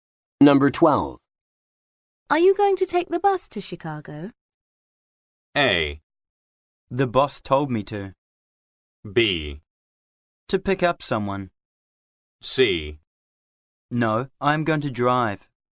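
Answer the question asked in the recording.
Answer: C: No, I'm going to drive.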